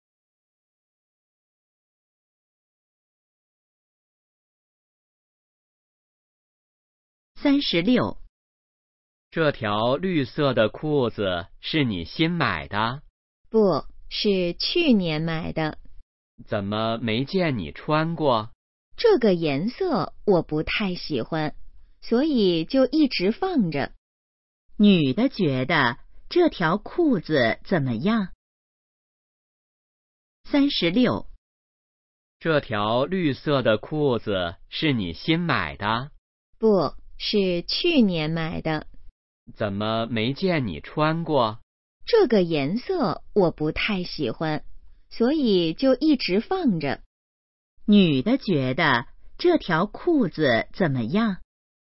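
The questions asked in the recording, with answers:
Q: 女的觉得这条裤子怎么样?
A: 颜色不太喜欢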